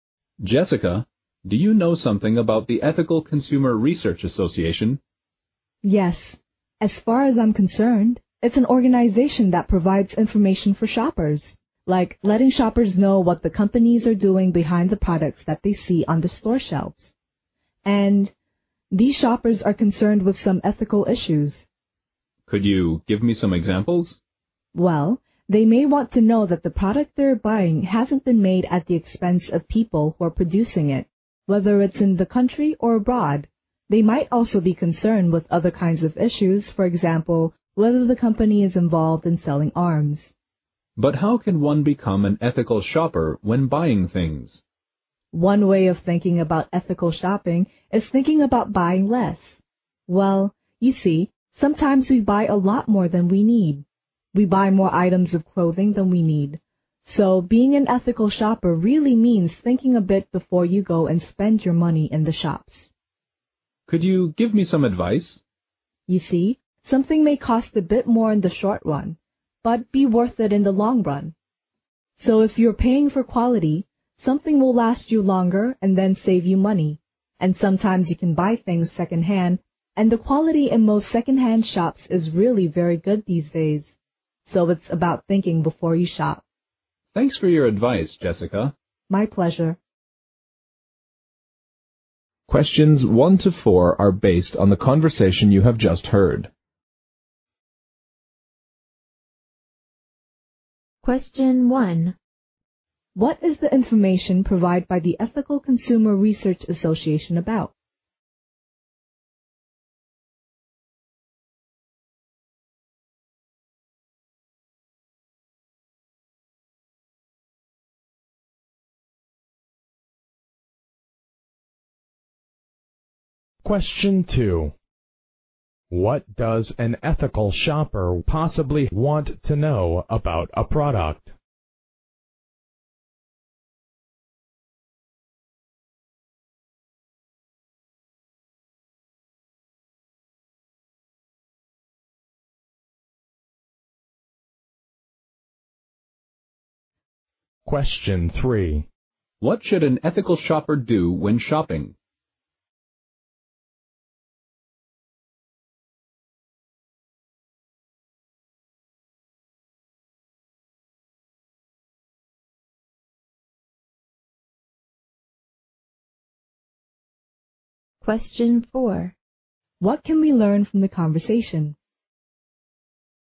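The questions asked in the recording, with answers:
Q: What is the information provided by the Ethical Consumer Research Association about?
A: What companies are doing behind the products on store shelves

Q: What does an ethical shopper possibly want to know about a product?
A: Whether it was made at the expense of the people producing it

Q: What should an ethical shopper do when shopping?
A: Think before shopping and buy less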